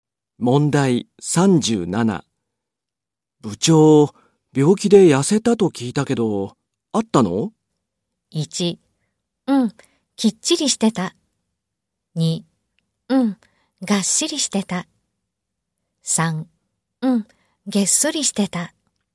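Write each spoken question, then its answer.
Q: 部長、病気で痩せたと聞いたけど、あったの?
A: 3: うん、げっそりしてた。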